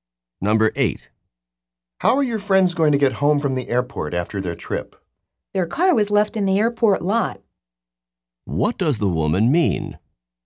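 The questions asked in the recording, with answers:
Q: What does the woman mean?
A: They left their car in the airport parking lot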